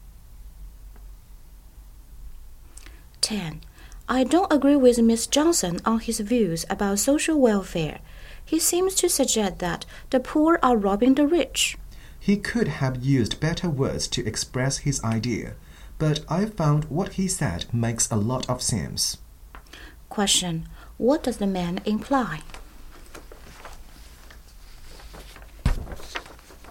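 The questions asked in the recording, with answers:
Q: What does the man imply?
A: What Johnson said makes sense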